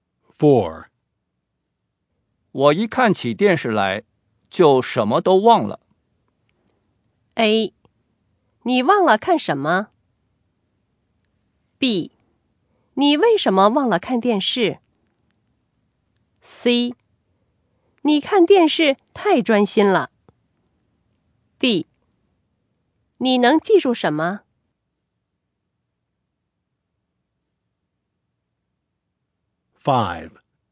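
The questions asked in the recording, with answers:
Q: 我一看起电视来,就什么都忘了。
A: C: 你看电视太专心了。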